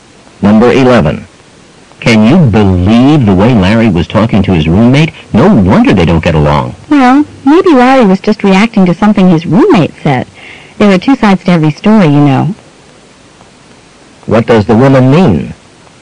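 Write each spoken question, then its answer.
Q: What does the woman mean?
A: Larry may not be entirely to blame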